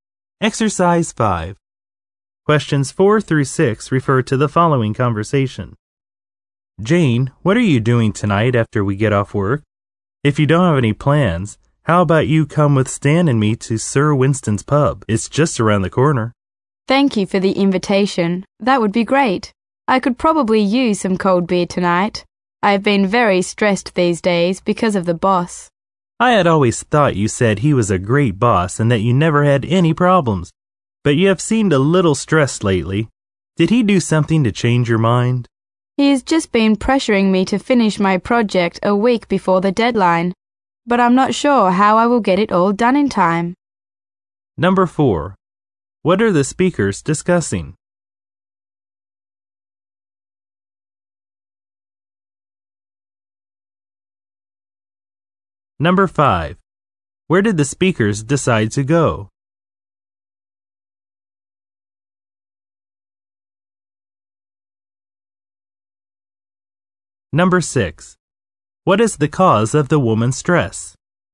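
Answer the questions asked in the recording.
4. Plans to go to a pub after work
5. Sir Winston's pub
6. Her boss pressuring her to finish her project a week before the deadline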